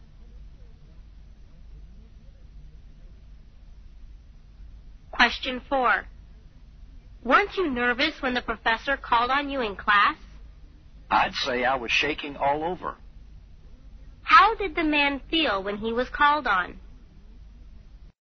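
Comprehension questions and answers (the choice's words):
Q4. How did the man feel when he was called on?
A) Worried and frightened.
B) Very relaxed.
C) Quite unhappy.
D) Angry with the professor.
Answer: Worried and frightened.

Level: 大学英语四级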